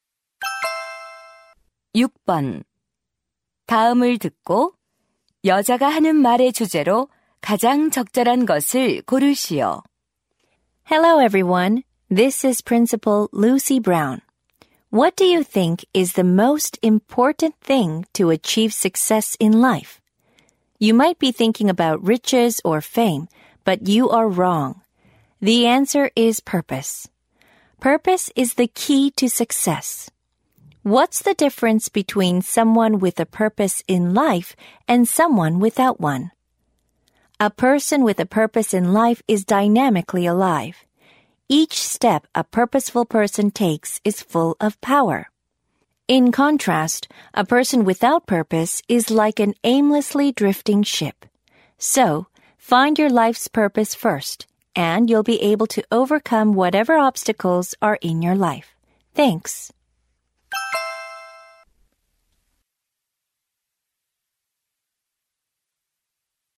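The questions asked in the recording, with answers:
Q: 다음을 듣고 여자가 하는 말의 주제로 가장 적절한 것을 고르시오.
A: 성공하려면 삶의 목적을 갖는 것이 중요하다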